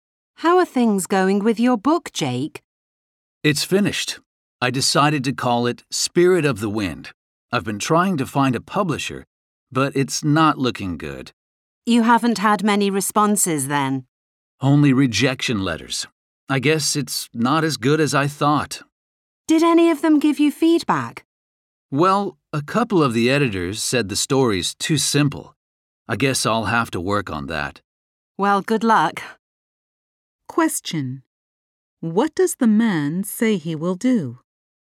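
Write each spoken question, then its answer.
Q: What does the man say he will do?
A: Work on making his story less simple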